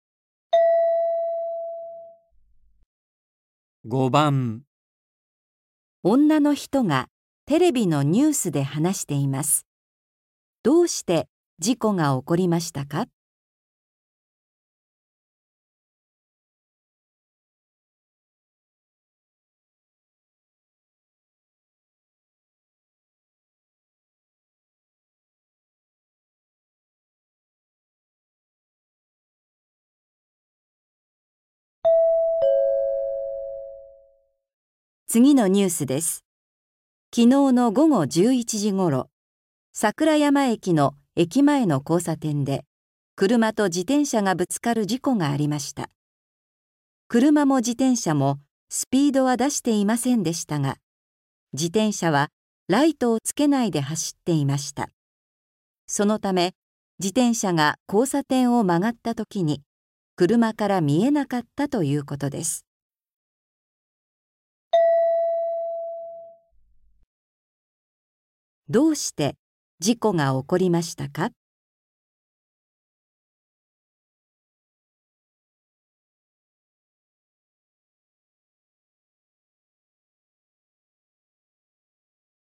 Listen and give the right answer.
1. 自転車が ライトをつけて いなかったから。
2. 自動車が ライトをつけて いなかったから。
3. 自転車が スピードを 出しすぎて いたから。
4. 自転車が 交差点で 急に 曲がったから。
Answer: 1. 自転車が ライトをつけて いなかったから。

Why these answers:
車も自転車も、スピードは出していませんでしたが、自転車はライトを付けないで走っていました。そのため、自転車が交差点を曲がった時に、車から見えなかった、ということです。

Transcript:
女の人がテレビのニュースで話しています。どうして事故が起こりましたか。
次のニュースです。昨日の午後11時ごろ、さくら山駅の駅前の交差点で、車と自転車がぶつかる事故がありました。車も自転車も、スピードは出していませんでしたが、自転車はライトを付けないで走っていました。そのため、自転車が交差点を曲がった時に、車から見えなかった、ということです。

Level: 初級